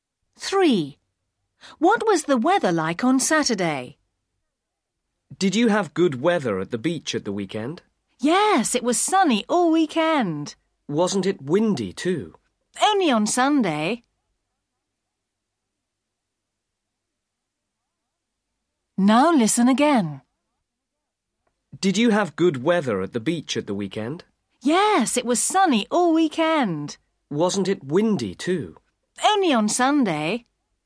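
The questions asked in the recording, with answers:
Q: What was the weather like on Saturday?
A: Sunny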